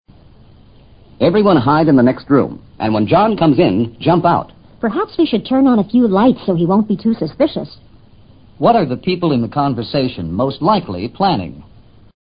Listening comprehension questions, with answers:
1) What are the people in the conversation most likely planning?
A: A surprise party.